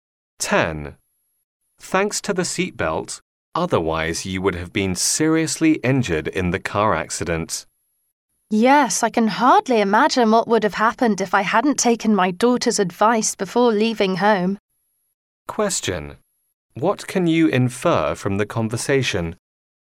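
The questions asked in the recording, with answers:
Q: What can you infer from the conversation?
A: The man wore his seatbelt on his daughter's advice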